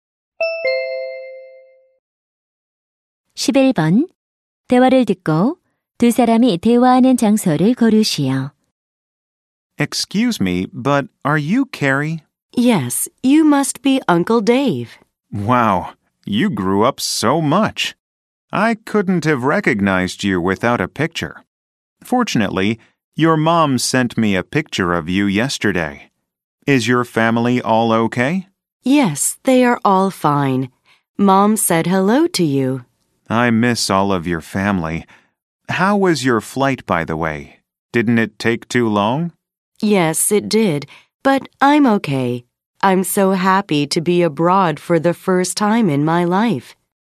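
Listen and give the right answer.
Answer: 공항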